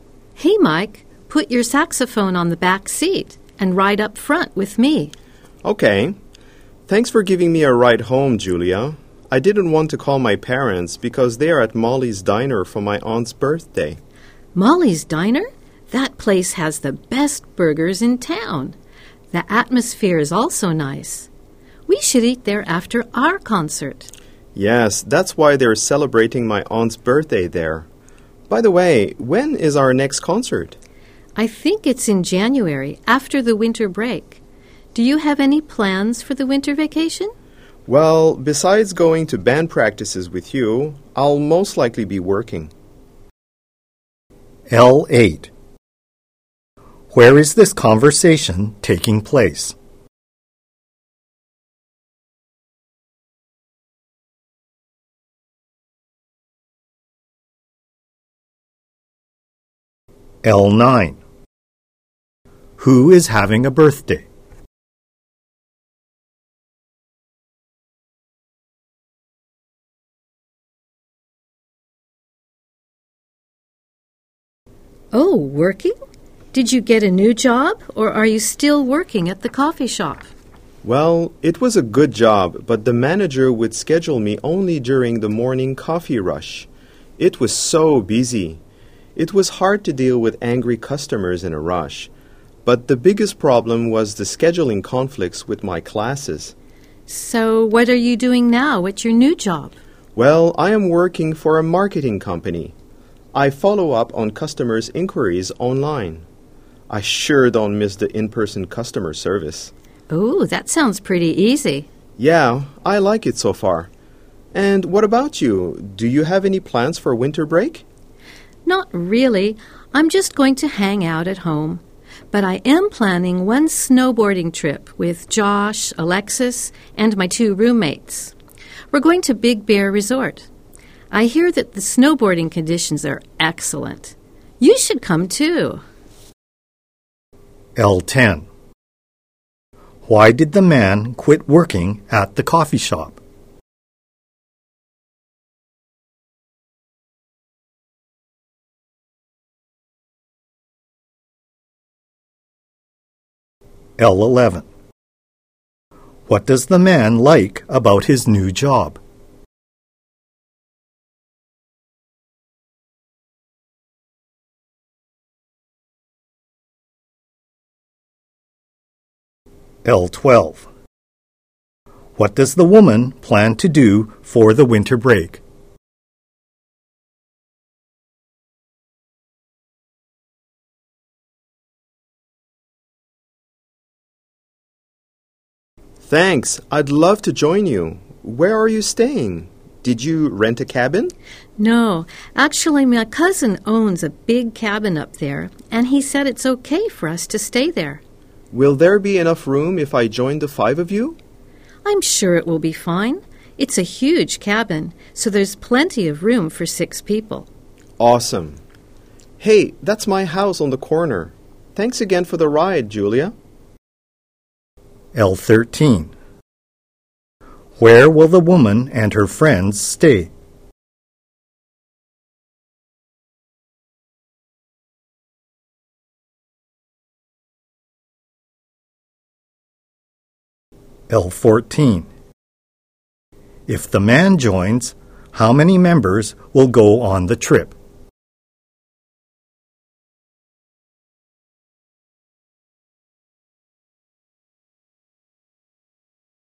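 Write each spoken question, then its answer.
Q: Where is this conversation taking place?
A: In a car

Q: Who is having a birthday?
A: The man's aunt

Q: Why did the man quit working at the coffee shop?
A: The schedule conflicted with his classes

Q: What does the man like about his new job?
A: No in-person customer service; he follows up on inquiries online

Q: What does the woman plan to do for the winter break?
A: Go on a snowboarding trip to Big Bear Resort

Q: Where will the woman and her friends stay?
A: In her cousin's cabin

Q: If the man joins, how many members will go on the trip?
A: Six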